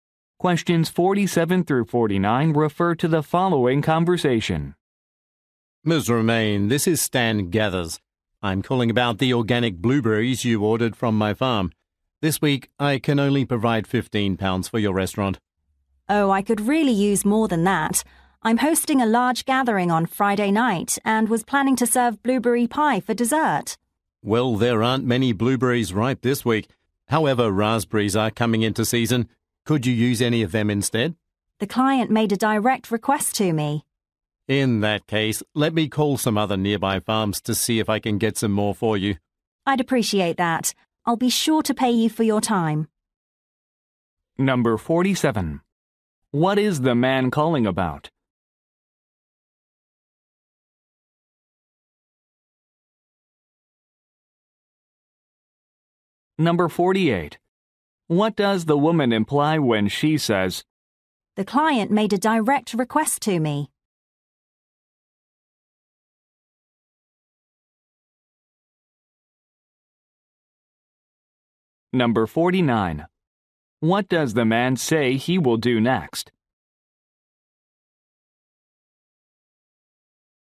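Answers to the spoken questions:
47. An order of blueberries
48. She cannot use raspberries instead; she needs blueberries
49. Call other nearby farms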